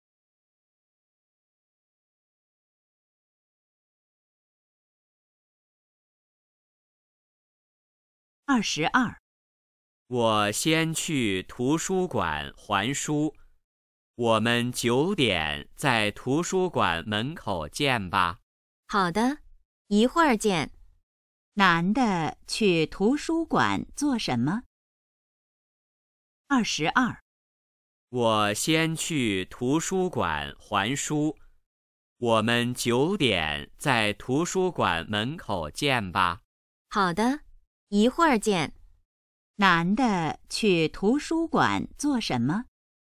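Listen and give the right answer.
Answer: 还书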